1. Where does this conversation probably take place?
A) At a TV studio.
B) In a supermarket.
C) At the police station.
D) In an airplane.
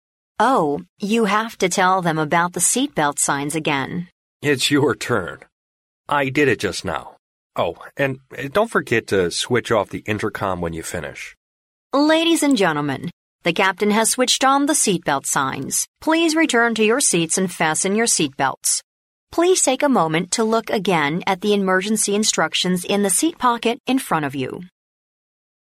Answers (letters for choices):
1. D

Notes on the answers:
录音中女士说到"the captain has switched on the seat-belt signs",由"captain"以及"seat-belt"等元素可推断该情景发生在飞机上。故选D项。

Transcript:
W: Oh, you have to tell them about the seat-belt signs again.
M: It's your turn. I did it just now. Oh, and don't forget to switch off the intercom when you finish.
W: Ladies and gentlemen, the captain has switched on the seat-belt signs. Please return to your seats and fasten your seat belts. Please take a moment to look again at the emergency instructions in the seat pocket in front of you.

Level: C类